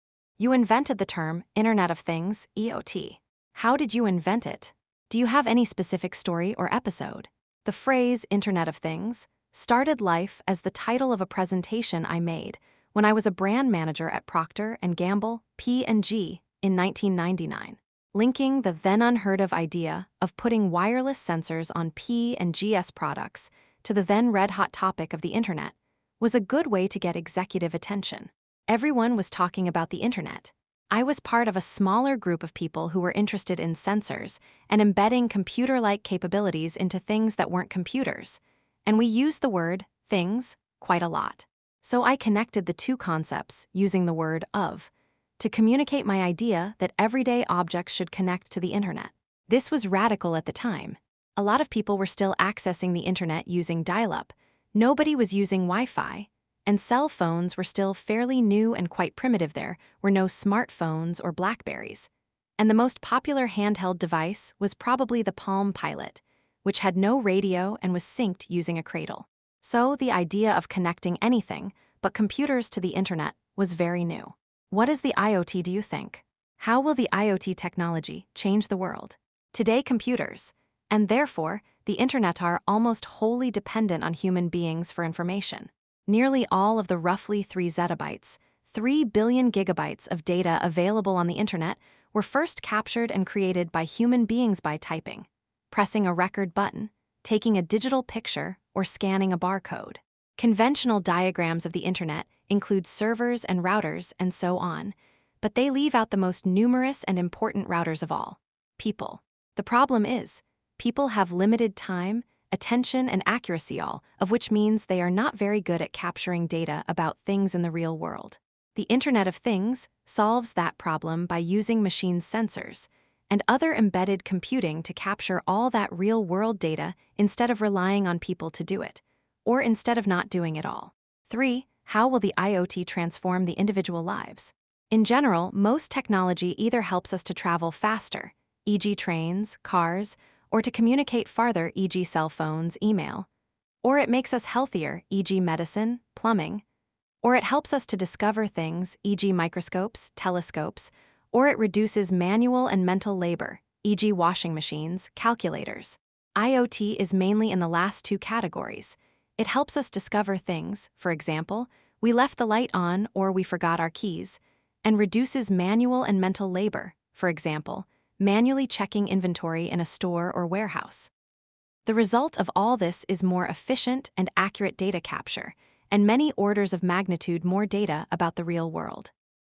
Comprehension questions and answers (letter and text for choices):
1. The central shift introduced by IoT is that real-world information can be ______.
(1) captured directly by sensors rather than first entered by people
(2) reduced until only computers can understand it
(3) kept offline to protect traditional routers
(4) produced only when users scan a bar code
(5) limited to travel and communication technologies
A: (1) captured directly by sensors rather than first entered by people

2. 다음은 윗글의 전개를 요약한 것이다. (A)~(C)를 글의 흐름에 맞게 배열한 것으로 가장 적절한 것은?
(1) (A) - (B) - (C)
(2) (B) - (A) - (C)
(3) (B) - (C) - (A)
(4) (C) - (A) - (B)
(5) (C) - (B) - (A)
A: (3) (B) - (C) - (A)

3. 윗글에서 the most numerous and important routers of all: people이 의미하는 바로 가장 적절한 것은?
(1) 사람의 신체가 인터넷 케이블을 물리적으로 대체한다.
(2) 기존 인터넷의 정보는 대부분 사람이 포착하고 입력해 전달했다.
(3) 서버보다 사람이 더 빠르게 모든 데이터를 계산한다.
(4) IoT는 사람의 정보 이용을 완전히 금지한다.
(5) 라우터 설계도에는 반드시 개인 이름을 표시해야 한다.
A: (2) 기존 인터넷의 정보는 대부분 사람이 포착하고 입력해 전달했다.

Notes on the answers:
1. 글은 사람이 타이핑하거나 촬영하던 현실 데이터를 센서와 임베디드 컴퓨팅이 대신 포착하는 것을 IoT의 해결책으로 제시합니다.
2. 용어의 탄생(B), 인간 중심 데이터 수집의 문제(C), 생활 속 효과(A)의 문답 순서로 전개됩니다.
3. 이어지는 설명은 인터넷 데이터가 타이핑, 녹음, 촬영, 스캔 등 인간의 행위로 생성되었다고 밝힙니다. 사람을 정보 전달의 핵심 경로에 비유한 것입니다.

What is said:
You invented the term 'Internet of Things(IoT)'. How did you invent it? Do you have any specific story or episode?
The phrase "Internet of Things" started life as the title of a presentation I made when I was a Brand Manager at Procter & Gamble (P&G) in 1999. Linking the then-unheard-of idea of putting wireless sensors on P&G's products to the then-red-hot topic of the Internet was a good way to get executive attention. Everyone was talking about the Internet. I was part of a smaller group of people who were interested in sensors and embedding computer-like capabilities into things that weren't computers, and we used the word "things" quite a lot. So I connected the two concepts using the word "of," to communicate my idea that everyday objects should connect to the Internet. This was radical at the time. A lot of people were still accessing the Internet using dial-up, nobody was using WiFi, and cell phones were still fairly new and quite primitive-there were no smart phones or Blackberries, and the most popular handheld device was probably the Palm Pilot, which had no radio and was synced using a cradle. So, the idea of connecting anything but computers to the Internet was very new.
What is the IoT do you think? How will the IoT technology change the world?
Today computers-and, therefore, the Internet-are almost wholly dependent on human beings for information. Nearly all of the roughly 3 zettabytes (3 billion gigabytes) of data available on the Internet were first captured and created by human beings-by typing, pressing a record button, taking a digital picture or scanning a bar code. Conventional diagrams of the Internet include servers and routers and so on, but they leave out the most numerous and important routers of all: people. The problem is, people have limited time, attention and accuracy-all of which means they are not very good at capturing data about things in the real world. The Internet of Things solves that problem by using machines-sensors, and other embedded computing- to capture all that real world data instead of relying on people to do it, or instead of not doing it all.
3.How will the IoT transform the individual lives?
In general, most technology either helps us to travel faster (e.g. trains, cars), or to communicate farther (e.g. cell phones, email), or it makes us healthier (e.g. medicine, plumbing), or it helps us to discover things (e.g. microscopes, telescopes) or it reduces manual and mental labor (e.g. washing machines, calculators). IoT is mainly in the last two categories-it helps us discover things (for example, we left the light on or we forgot our keys) and reduces manual and mental labor (for example, manually checking inventory in a store or warehouse.) The result of all this is more efficient and accurate data capture, and many orders of magnitude more data about the real world.
The result of all this is more efficient and accurate data capture, and many orders of magnitude more data about the real world.

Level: 고3 · CEFR B2-C1